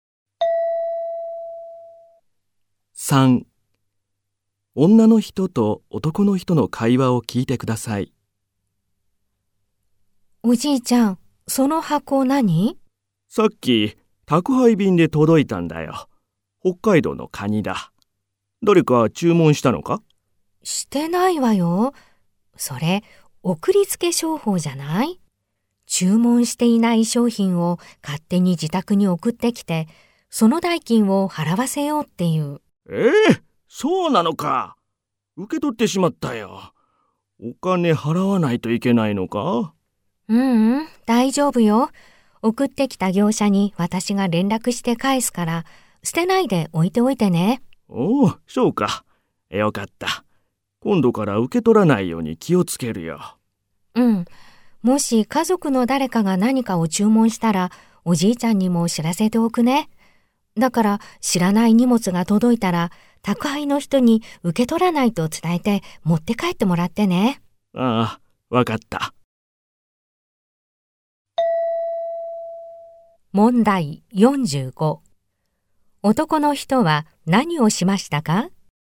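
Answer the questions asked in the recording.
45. 注文していないカニの荷物を受け取った
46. 女の人が業者に連絡して返す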